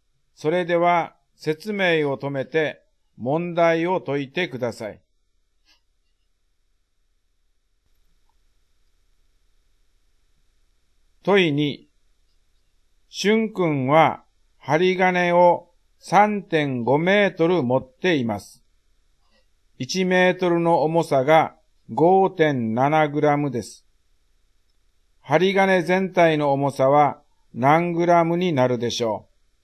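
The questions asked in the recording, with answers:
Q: 針金全体の重さは何グラムになるでしょう。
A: 19.95グラム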